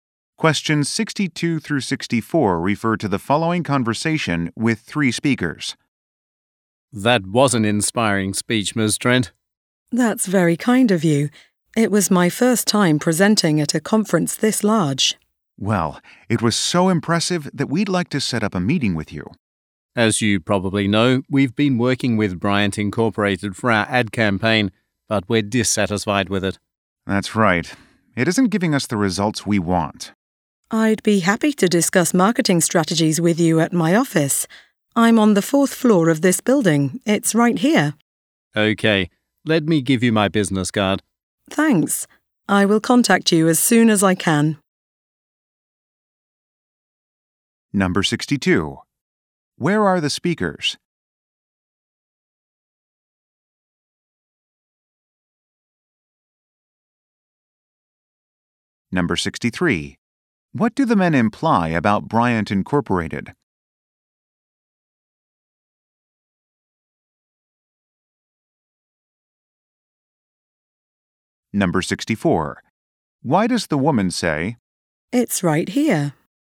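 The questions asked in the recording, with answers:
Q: Where are the speakers?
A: At a conference

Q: What do the men imply about Bryant Incorporated?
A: They are dissatisfied with its ad campaign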